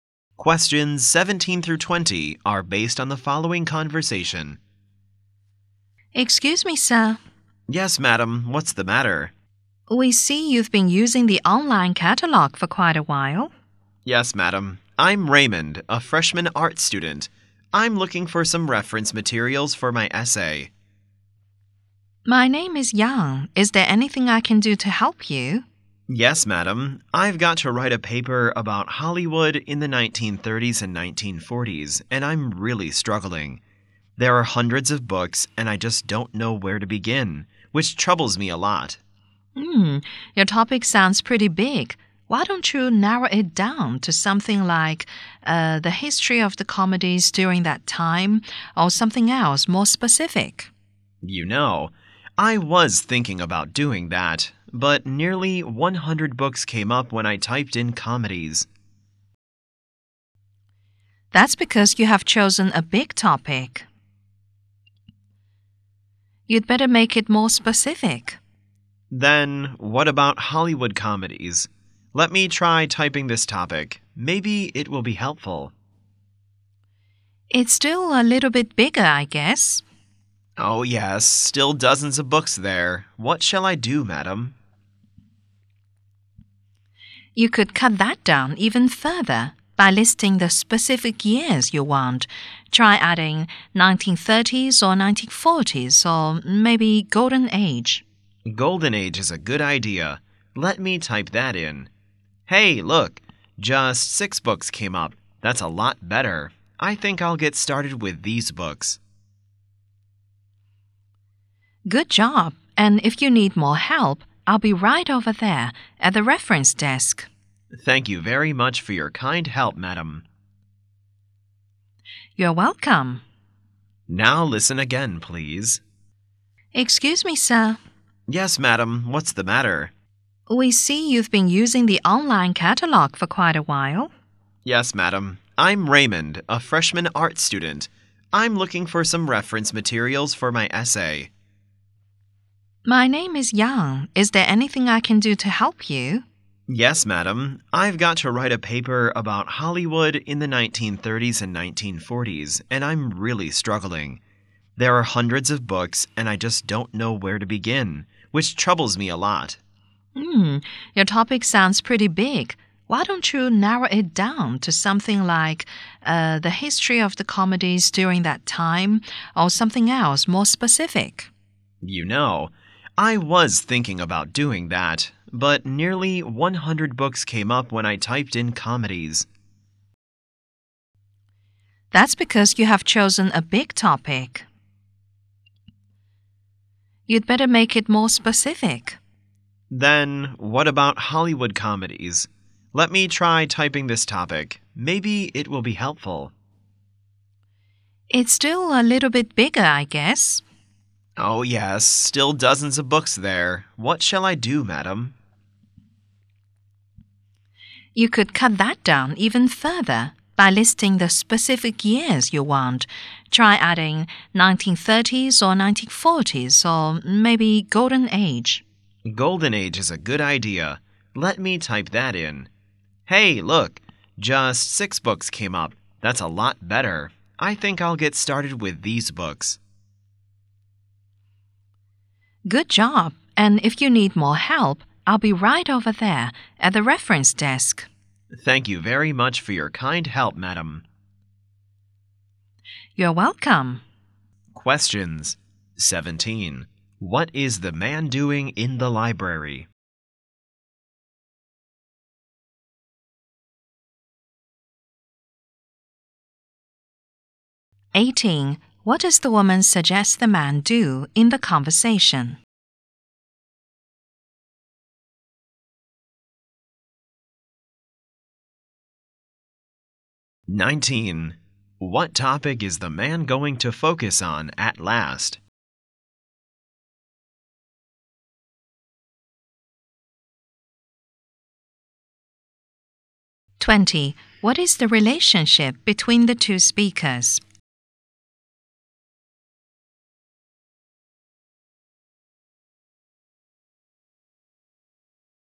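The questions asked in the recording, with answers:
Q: What is the man doing in the library?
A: Looking for reference materials for his essay

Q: What does the woman suggest the man do in the conversation?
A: Narrow down his topic

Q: What topic is the man going to focus on at last?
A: Hollywood comedies of the Golden Age

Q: What is the relationship between the two speakers?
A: Librarian and student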